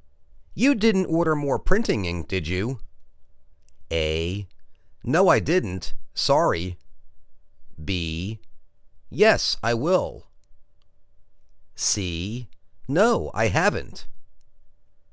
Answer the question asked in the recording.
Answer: No I didn't. Sorry.